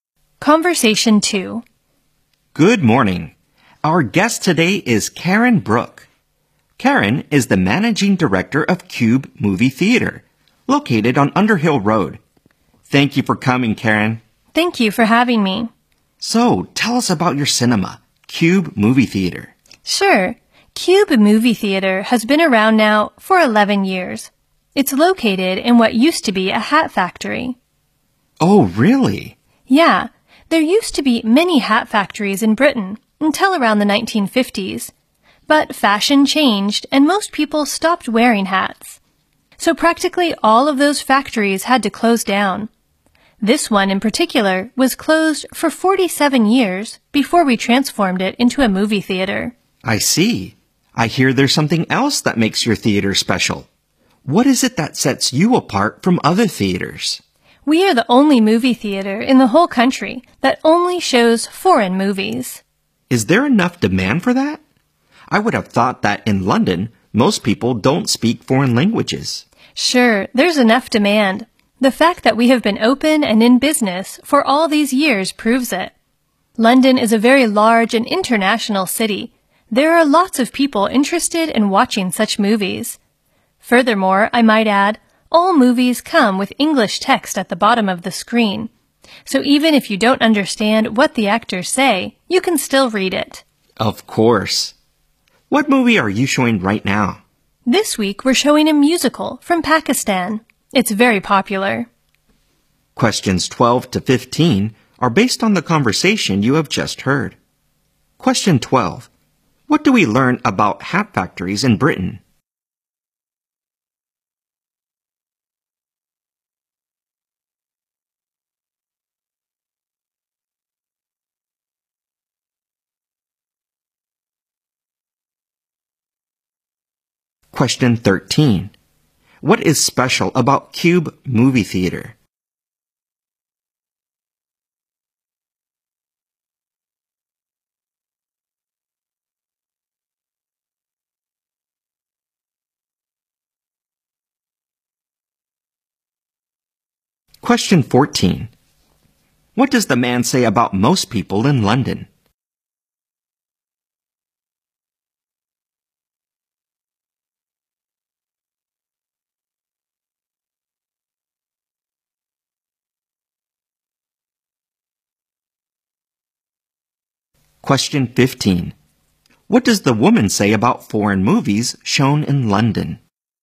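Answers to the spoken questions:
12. Almost all of them closed after fashion changed
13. It is the only theater in the country that shows only foreign movies
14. They don't speak foreign languages
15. They have English subtitles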